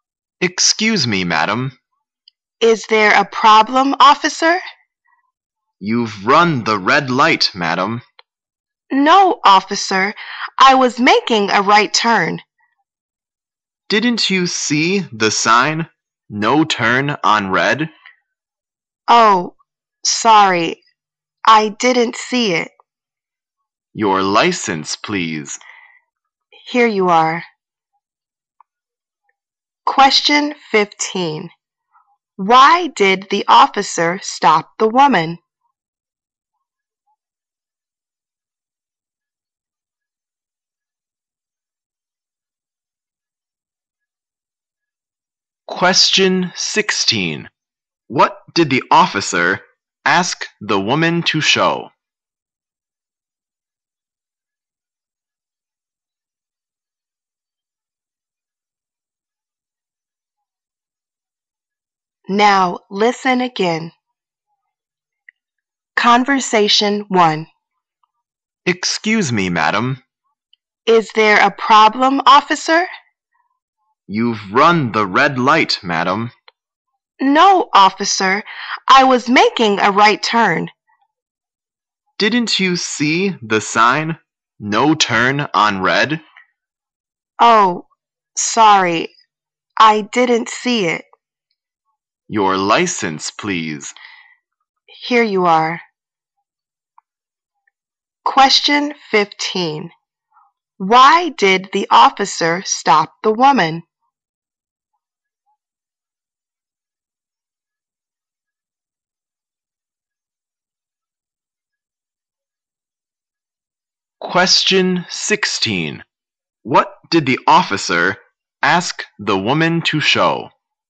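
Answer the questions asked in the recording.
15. She ran the red light
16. Her license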